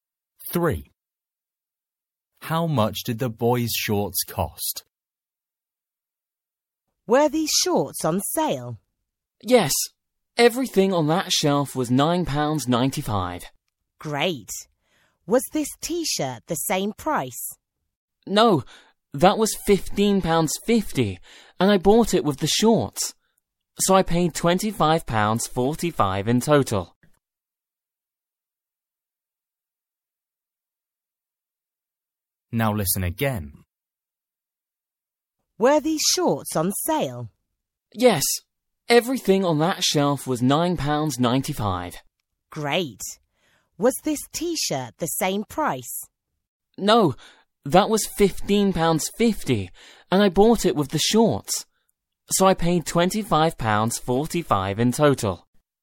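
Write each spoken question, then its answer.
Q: How much did the boys' shorts cost?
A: £9.95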